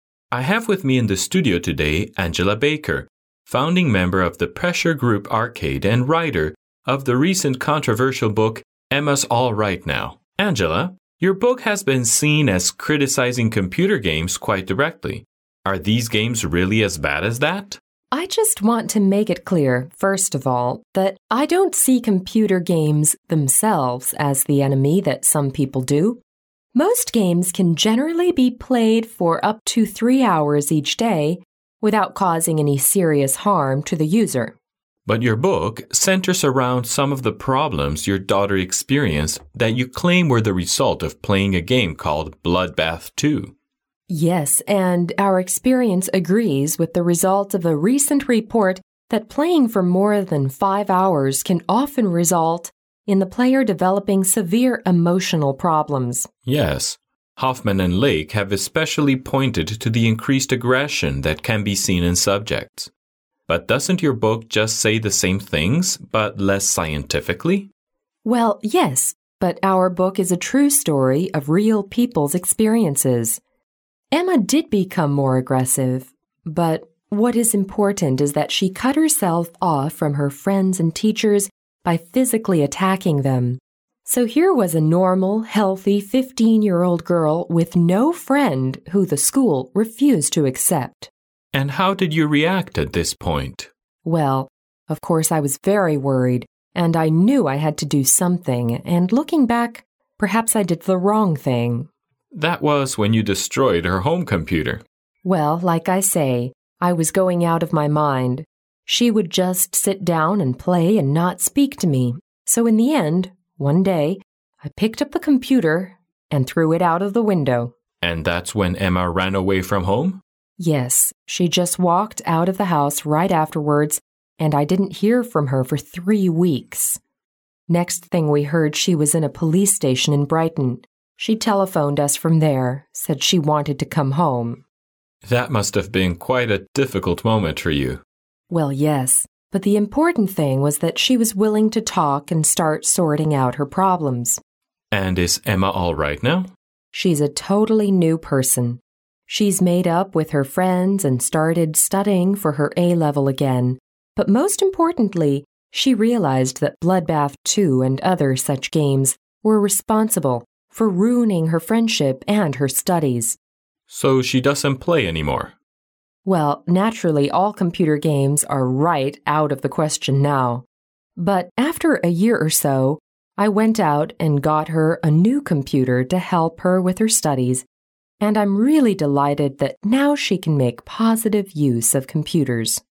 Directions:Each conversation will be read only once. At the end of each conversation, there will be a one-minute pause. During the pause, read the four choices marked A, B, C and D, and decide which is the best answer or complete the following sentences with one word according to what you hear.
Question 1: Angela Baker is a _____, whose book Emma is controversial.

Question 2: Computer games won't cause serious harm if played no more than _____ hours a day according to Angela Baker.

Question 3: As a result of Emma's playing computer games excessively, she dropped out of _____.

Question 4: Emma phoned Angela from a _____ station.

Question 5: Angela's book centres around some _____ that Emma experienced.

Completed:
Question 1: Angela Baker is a writer, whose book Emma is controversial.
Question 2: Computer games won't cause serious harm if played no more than 3/three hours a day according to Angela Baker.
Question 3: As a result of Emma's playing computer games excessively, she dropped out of school.
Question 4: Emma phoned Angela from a police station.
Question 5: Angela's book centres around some problems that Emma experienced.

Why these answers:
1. 录音开头提到"Angela Baker, writer of the recent controversial book Emm

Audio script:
M: I have with me in the studio today, Angela Baker, founding member of the pressure group arcade and writer of the recent controversial book Emma's all right now. Angela, your book has been seen as criticizing computer games quite directly. Are these games really as bad as that?
W: I just want to make it clear, first of all, that I don't see computer games themselves as the enemy that some people do. Most games can generally be played for up to 3 hours each day without causing any serious harm to the user.
M: But your book centres around some of the problems your daughter experienced that you claim were the result of playing a game called Bloodbath II.
W: Yes, and our experience agrees with the result of a recent report that playing for more than five hours can often result in the player developing severe emotional problems.
M: Yes, Hoffman and Lake have especially pointed to the increased aggression that can be seen in subjects. But doesn't your book just say the same things but less scientifically?
W: Well, yes, but our book is a true story of real people's experiences. Emma did become more aggressive but what is important is that she cut herself off from her friends and teachers by physically attacking them. So here was a normal healthy fifteen-year-old girl with no friend who the school refused to accept.
M: And how did you react at this point?
W: Well, of course I was very worried and I knew I had to do something. And looking back, perhaps I did the wrong thing.
M: That was when you destroyed her home computer.
W: Well, like I say, I was going out of my mind. She would just sit down and play and not speak to me. So, in the end, one day, I picked up the computer and threw it out of the window.
M: And that's when Emma ran away from home?
W: Yes, she just walked out of the house right afterwards and I didn't hear from her for three weeks. Next thing we heard, she was in a police station in Brighton. She telephoned us from there, and said she wanted to come home.
M: That must have been quite a difficult moment for you.
W: Well, yes, hut the important thing was that she was willing to talk and start sorting out her problems.
M: And is Emma all right now?
W: She's a totally new person. She's made up with her friends and started studying for her A-level again but moat importantly she realized that Bloodbath II and other such games were responsible for ruining her friendship and her studies.
M: So she doesn't play any more.
W: Well, naturally all computer games are right out of the question now, hut after a year or so I went out and got her a new computer to help her with her studies and I'm really delighted that now she can make positive use of computers.